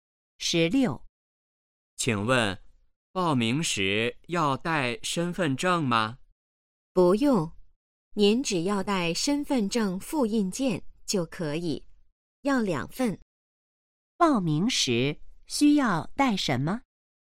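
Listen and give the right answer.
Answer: 两份身份证复印件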